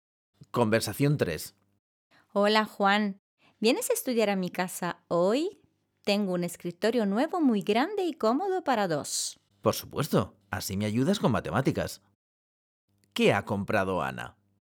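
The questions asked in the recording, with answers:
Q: ¿Qué ha comprado Ana?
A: Un escritorio nuevo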